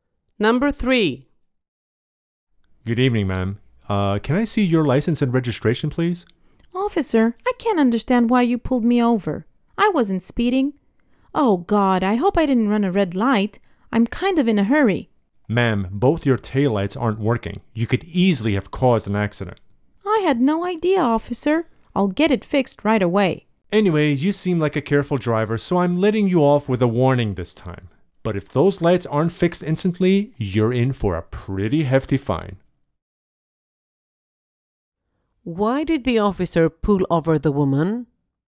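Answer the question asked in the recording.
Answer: Both of her taillights weren't working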